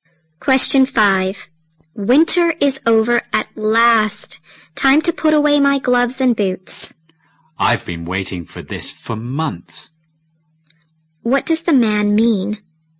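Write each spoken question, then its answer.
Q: What does the man mean?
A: He is glad winter is finally over.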